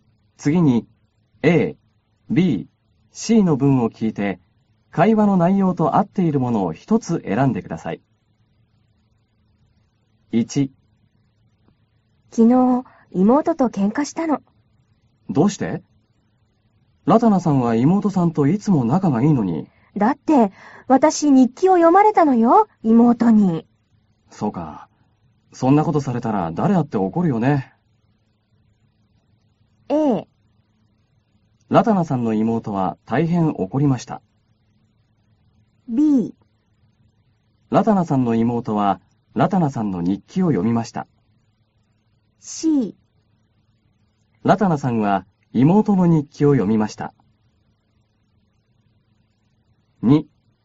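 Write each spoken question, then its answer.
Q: 次に A、B、C の文を聞いて、会話の内容と合っているものを一つ選んでください。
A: B: ラタナさんの妹はラタナさんの日記を読みました。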